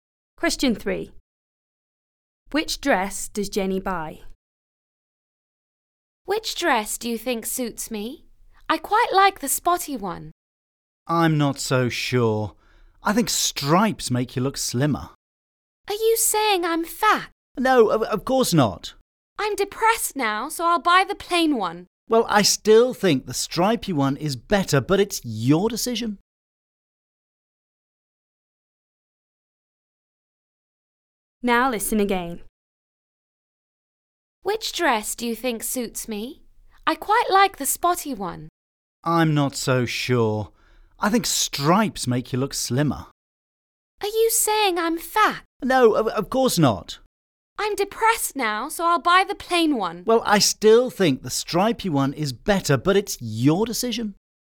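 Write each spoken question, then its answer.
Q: Which dress does Jenny buy?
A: The plain one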